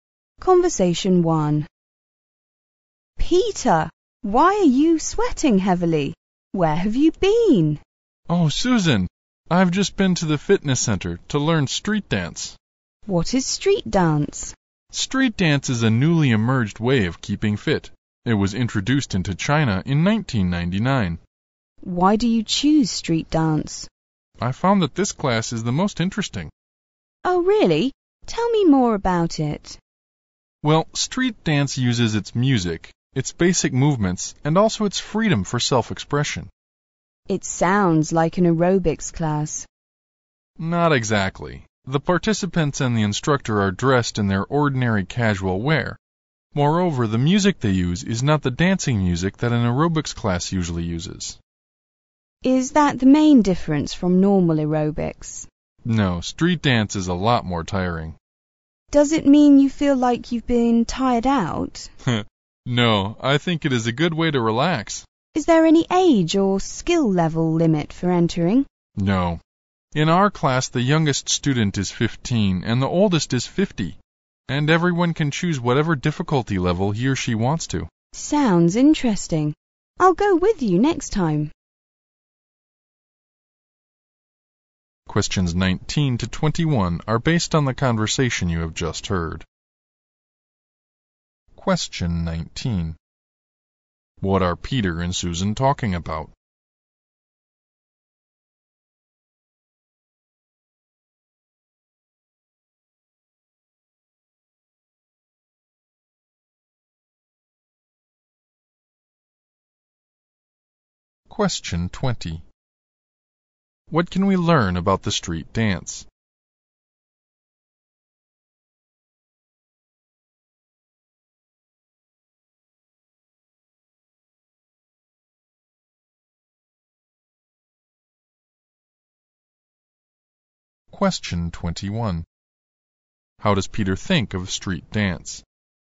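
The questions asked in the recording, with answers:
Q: What are Peter and Susan talking about?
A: Street dance

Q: How does Peter think of street dance?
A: It is interesting, tiring but a good way to relax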